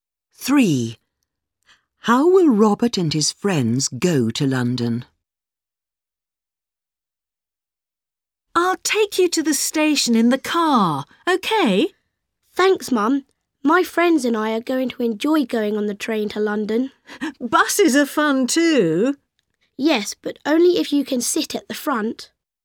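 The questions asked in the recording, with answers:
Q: How will Robert and his friends go to London?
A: By train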